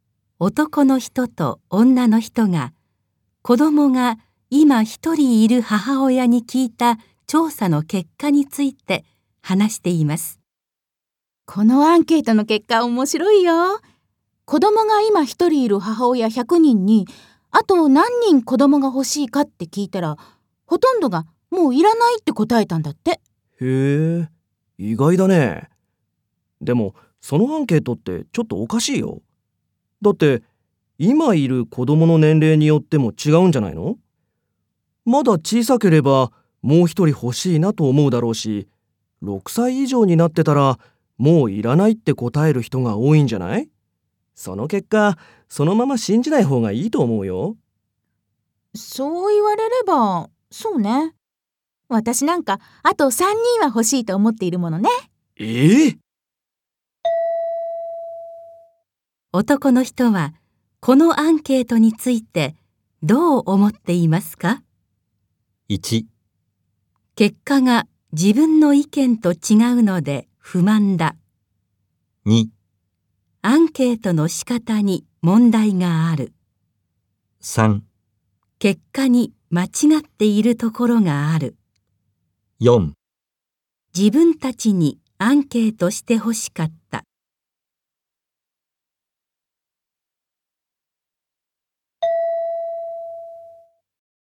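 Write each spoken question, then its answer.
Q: 男の人はこのアンケートについてどう思っていますか?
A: 2: アンケートの仕方に問題がある。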